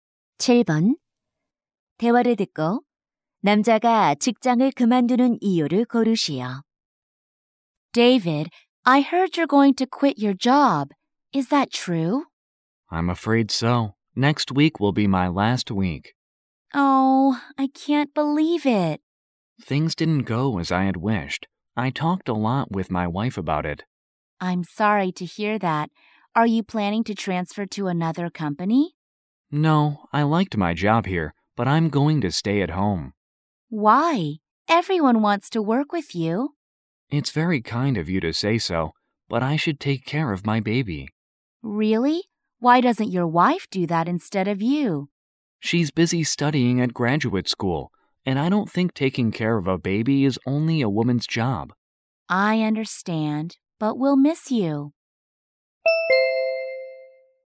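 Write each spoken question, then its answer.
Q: 대화를 듣고 남자가 직장을 그만두는 이유를 고르시오.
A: 아기를 돌보기 위해서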